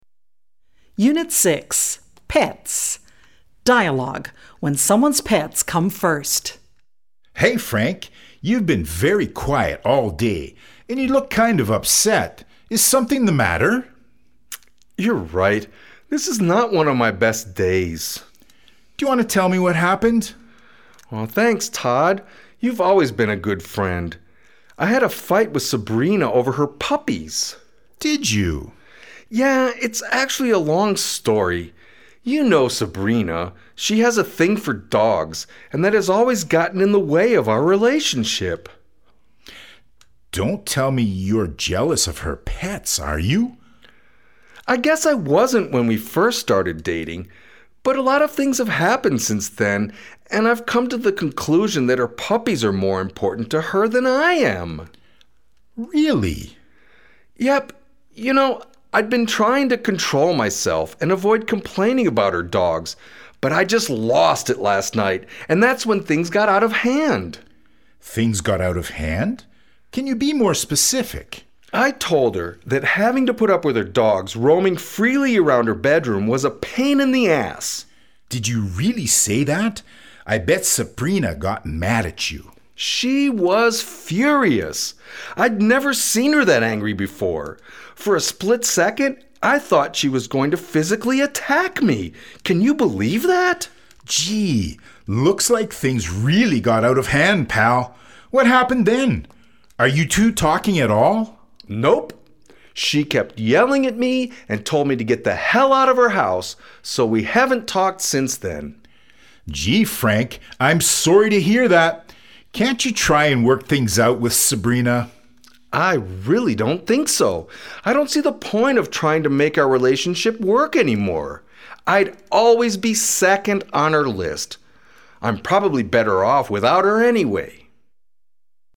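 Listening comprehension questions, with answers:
Dialogue Comprehension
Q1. Sabrina slapped Frank on the face.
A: False

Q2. Frank and Sabrina are not talking anymore.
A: True

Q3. Sabrina kicked Frank out of her house.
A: True

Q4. Todd doesn ́t have a pet.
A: I don ́t know

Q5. Frank plans to call Sabrina and apologize for his behavior.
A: False

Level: B2 level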